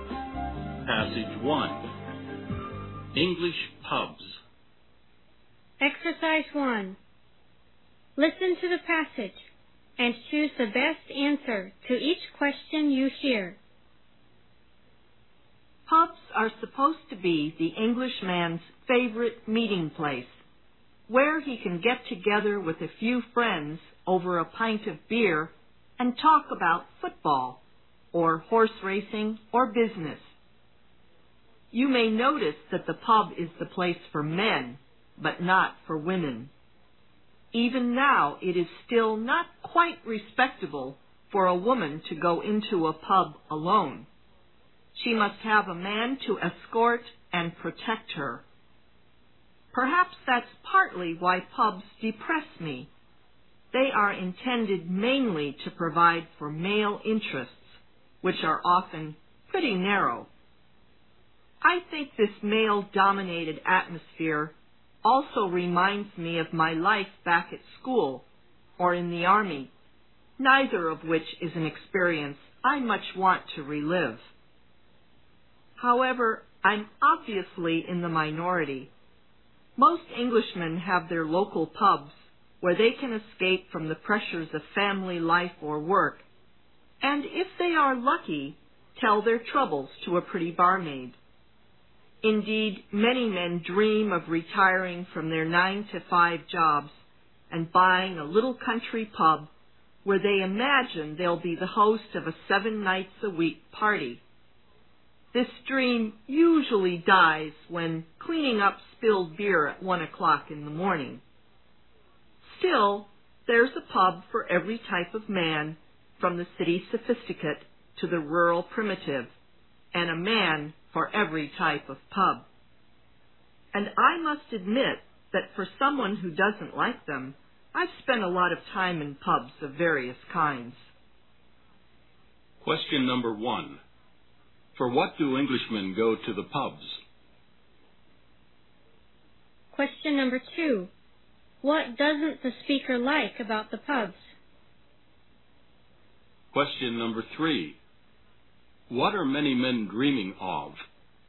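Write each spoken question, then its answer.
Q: For what do Englishmen go to the pubs?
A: To get together with friends over beer and talk

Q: What doesn't the speaker like about the pubs?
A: Their male-dominated atmosphere and narrow male interests

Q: What are many men dreaming of?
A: Retiring and buying a little country pub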